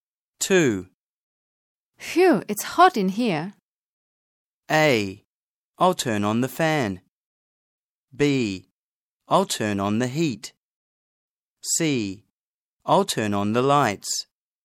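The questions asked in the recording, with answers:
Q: Phew, it's hot in here.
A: A: I'll turn on the fan.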